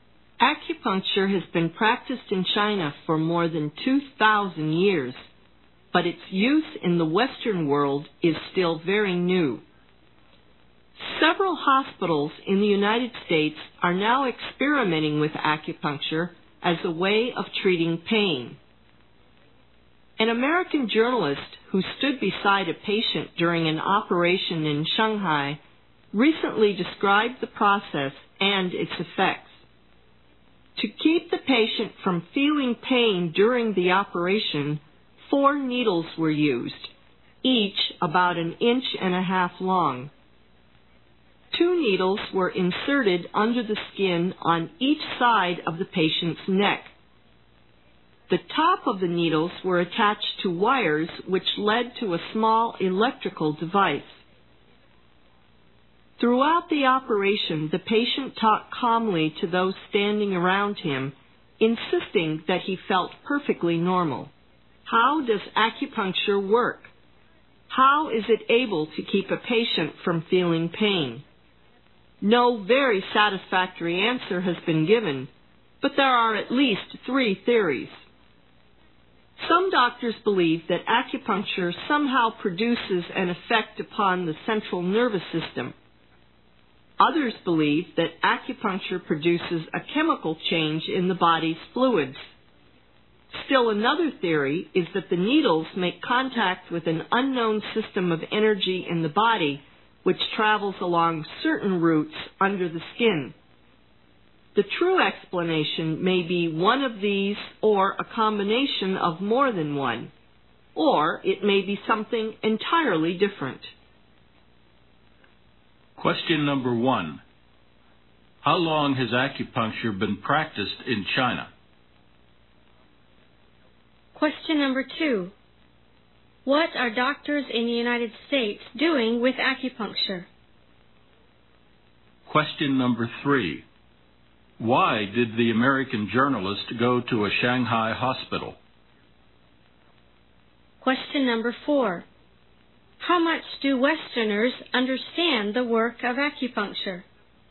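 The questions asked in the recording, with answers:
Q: How long has acupuncture been practiced in China?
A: For more than 2,000 years

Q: What are doctors in the United States doing with acupuncture?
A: Experimenting with it as a way of treating pain

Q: How much do Westerners understand the work of acupuncture?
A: Not much; there is no satisfactory explanation, only theories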